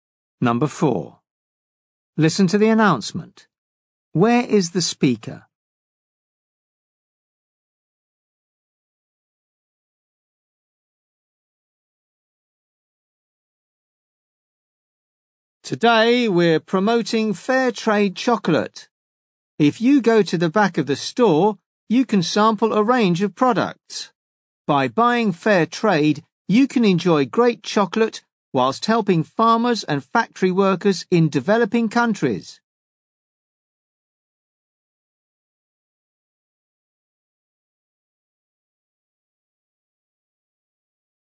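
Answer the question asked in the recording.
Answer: In a store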